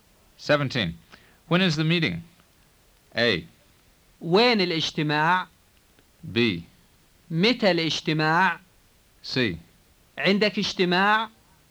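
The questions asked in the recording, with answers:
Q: When is the meeting?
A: B: متى الاجتماع؟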